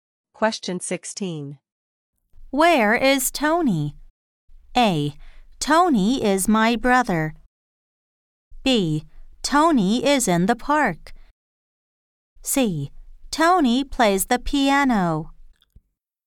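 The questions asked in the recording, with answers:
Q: Where is Tony?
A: B: Tony is in the park.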